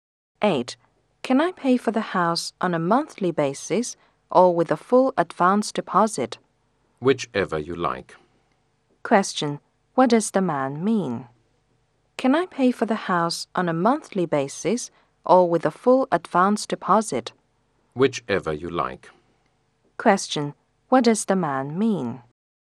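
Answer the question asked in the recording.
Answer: Either monthly payment or full advance deposit is fine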